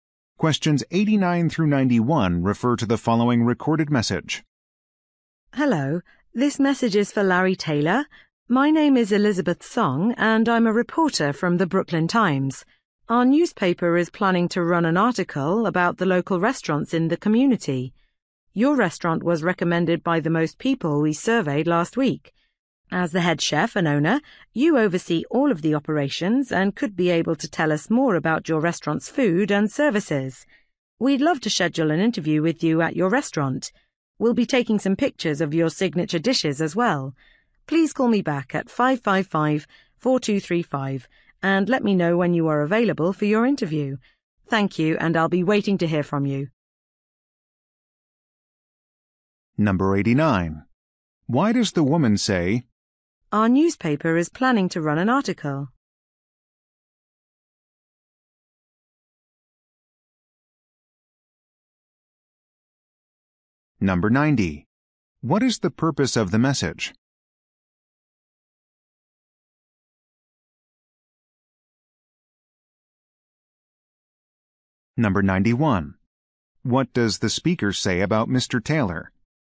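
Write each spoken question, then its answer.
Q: What is the purpose of the message?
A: To ask for an interview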